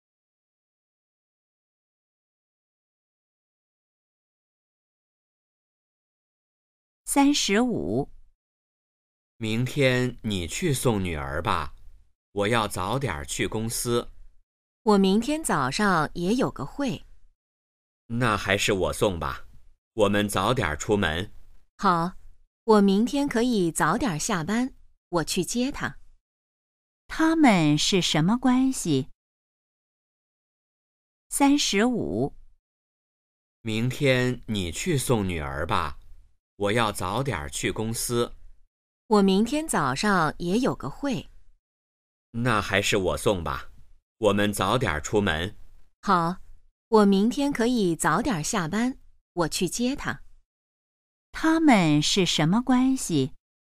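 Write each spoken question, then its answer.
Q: 他们是什么关系?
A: 夫妻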